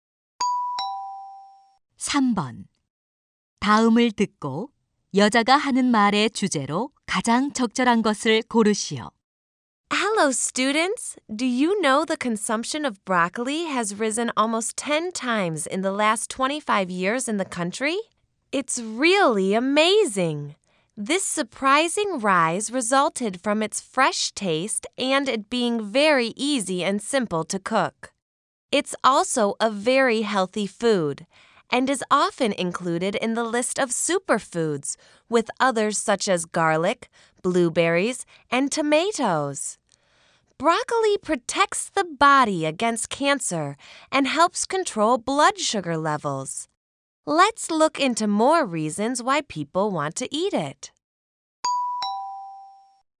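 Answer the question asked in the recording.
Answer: 브로콜리 소비가 늘어난 이유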